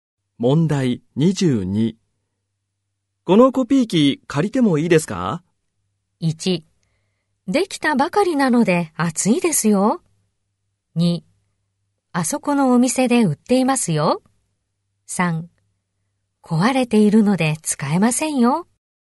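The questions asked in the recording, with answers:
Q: このコピー機借りてもいいですか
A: 3: 壊れているので使えませんよ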